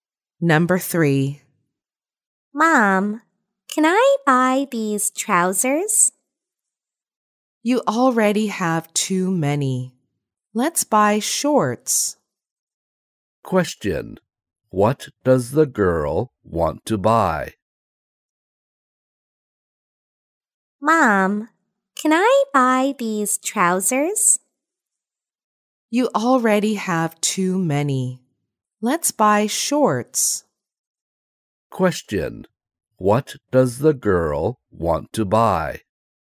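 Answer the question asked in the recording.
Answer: Trousers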